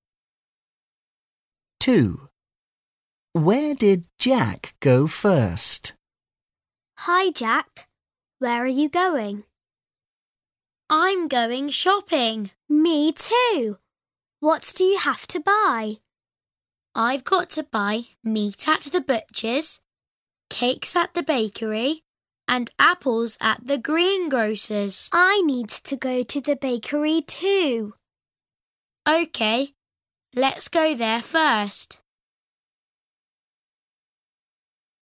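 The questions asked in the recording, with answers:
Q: Where did Jack go first?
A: The bakery.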